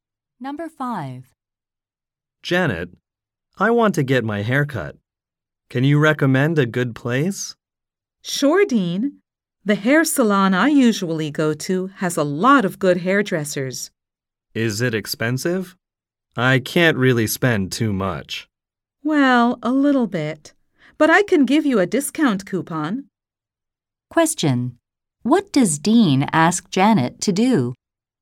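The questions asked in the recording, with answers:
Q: What does Dean ask Janet to do?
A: Recommend a hair salon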